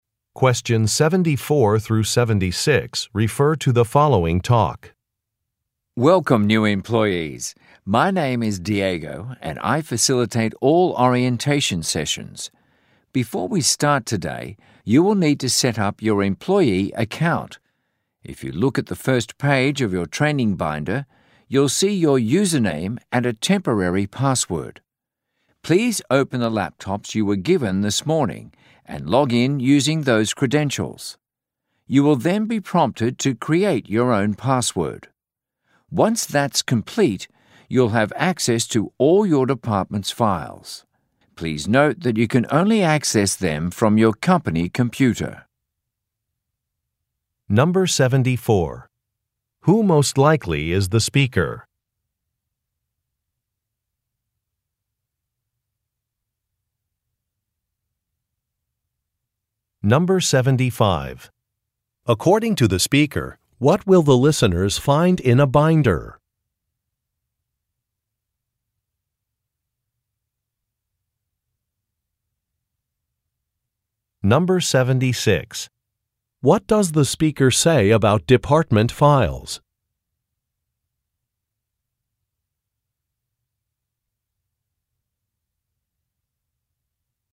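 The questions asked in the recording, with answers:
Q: Who most likely is the speaker?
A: An orientation facilitator for new employees

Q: According to the speaker, what will the listeners find in a binder?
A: Their username and a temporary password

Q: What does the speaker say about department files?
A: They can only be accessed from a company computer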